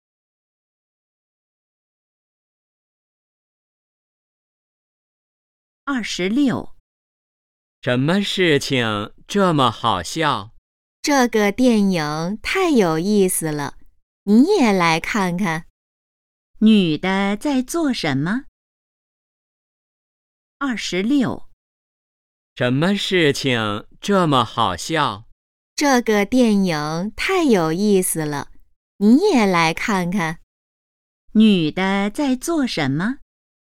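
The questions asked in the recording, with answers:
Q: 女的在做什么?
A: 看电影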